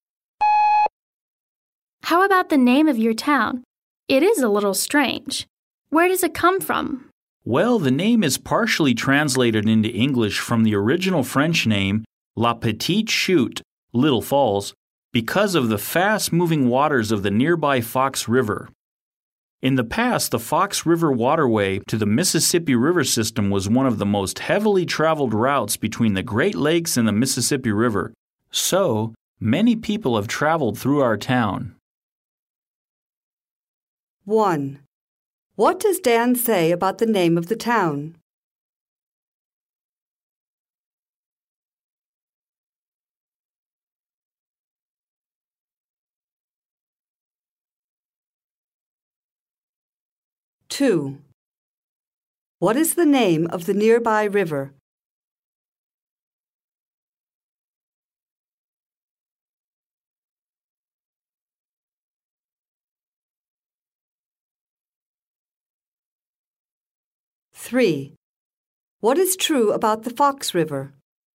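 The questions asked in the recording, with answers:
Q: What does Dan say about the name of the town?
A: It is partially translated into English from the French name La Petite Chute (Little Falls)

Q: What is the name of the nearby river?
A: The Fox River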